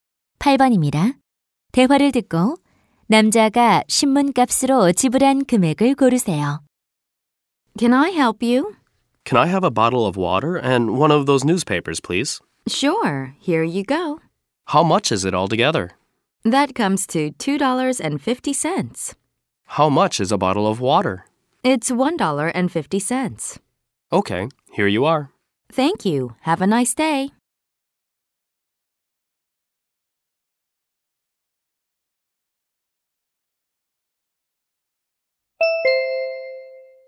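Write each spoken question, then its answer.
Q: 대화를 듣고 남자가 신문값으로 지불한 금액을 고르세요.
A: 1달러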